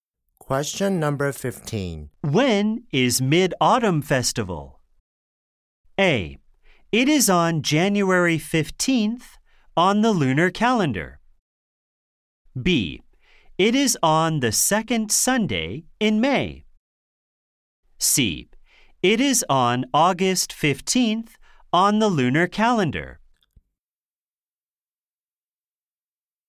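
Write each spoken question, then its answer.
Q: When is Mid-Autumn Festival?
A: C: It is on August 15th on the lunar calendar.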